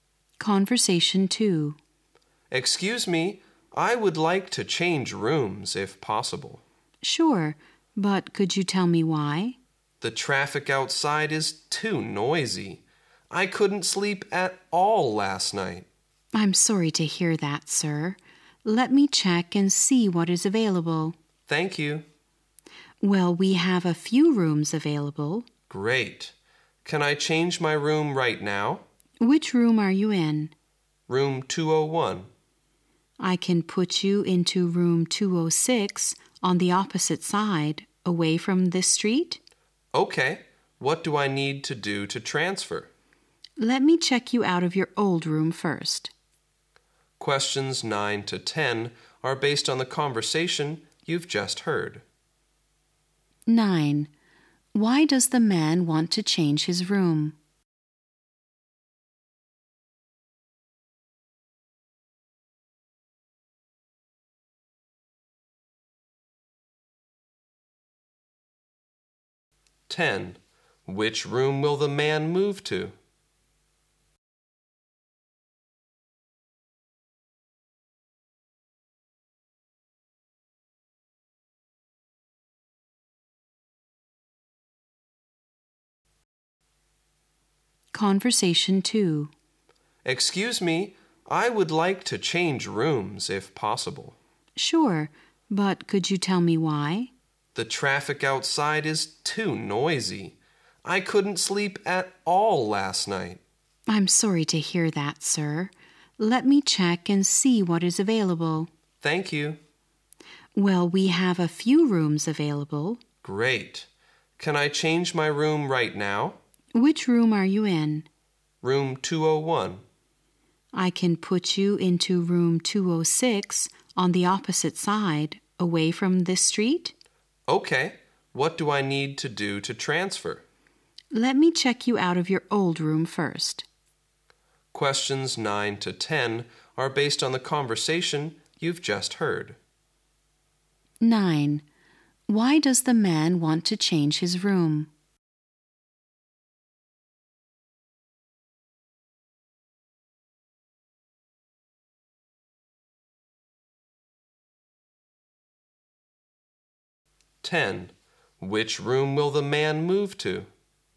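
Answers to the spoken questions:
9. The traffic outside is too noisy
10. Room 206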